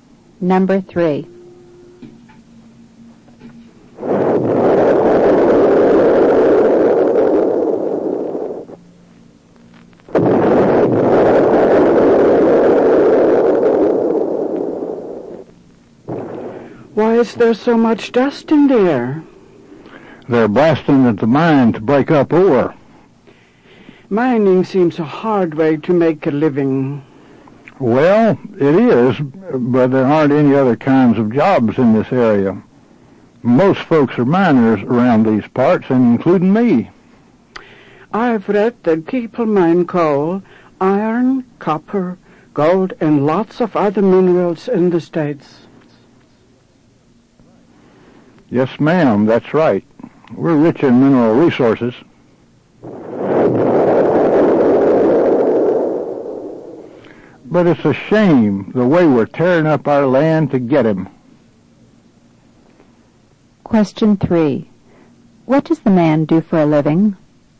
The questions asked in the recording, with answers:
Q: What does the man do for a living?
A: The answer is, he's a miner.